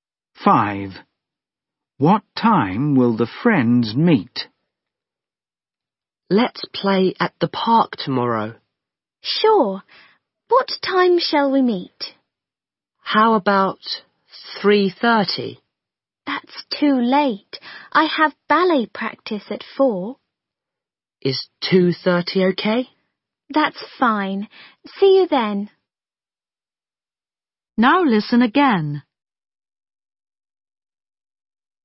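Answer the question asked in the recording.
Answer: 2:30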